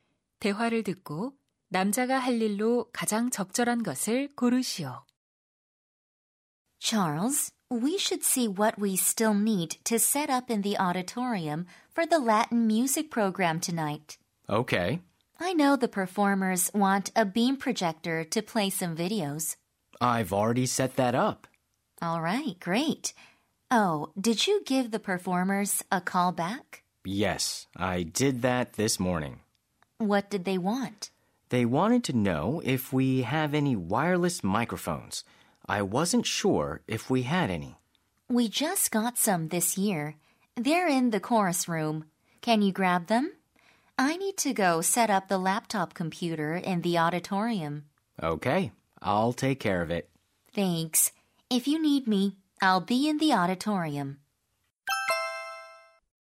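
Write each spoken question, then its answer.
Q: 대화를 듣고 남자가 할 일로 가장 적절한 것을 고르시오.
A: 합창실에서 무선 마이크 가져오기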